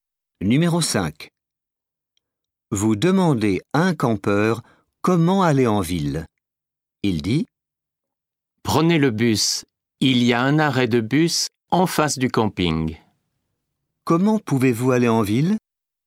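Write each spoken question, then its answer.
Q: Comment pouvez-vous aller en ville?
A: En bus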